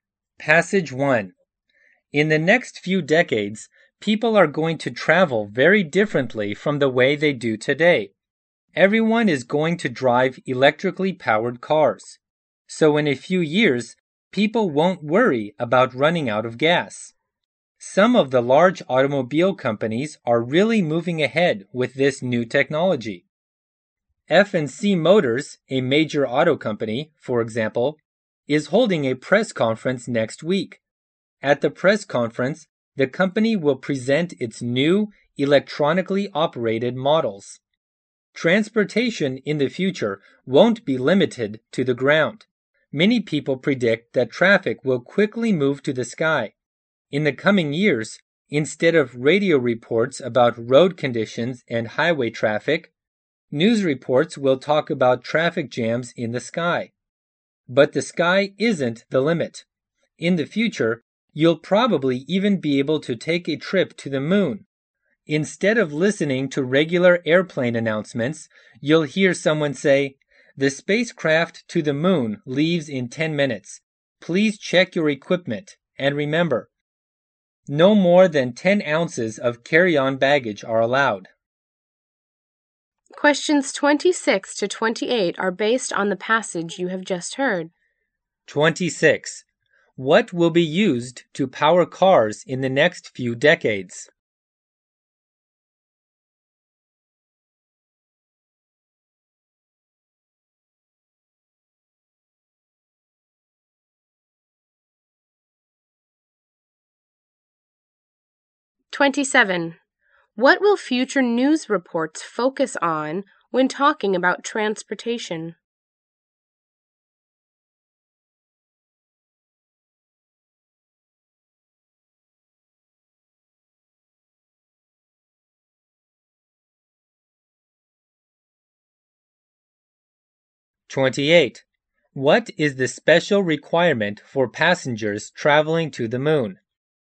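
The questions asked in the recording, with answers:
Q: What will be used to power cars in the next few decades?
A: Electricity.

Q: What will future news reports focus on when talking about transportation?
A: Traffic jams in the sky.

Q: What is the special requirement for passengers traveling to the moon?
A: No more than 10 ounces of carry-on baggage.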